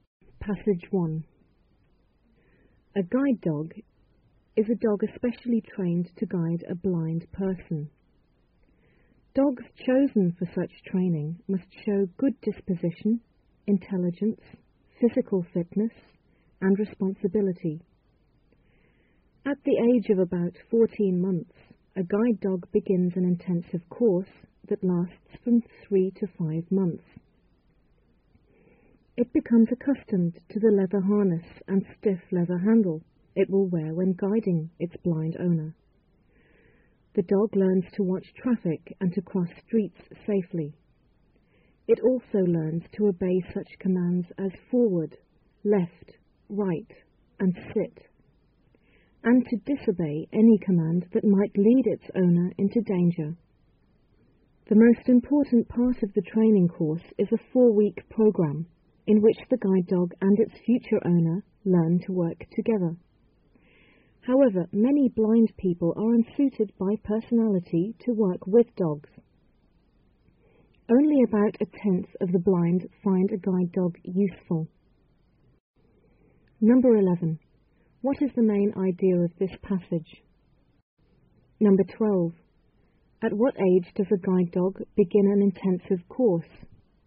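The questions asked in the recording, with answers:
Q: What is the main idea of this passage?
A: How guide dogs are trained to guide blind people

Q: At what age does a guide dog begin an intensive course?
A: About 14 months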